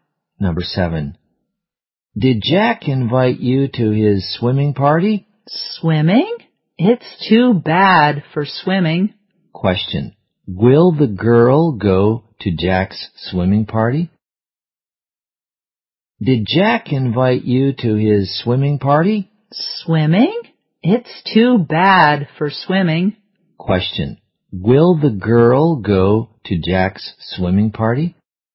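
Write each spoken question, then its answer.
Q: Question, will the girl go to Jack's swimming party?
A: No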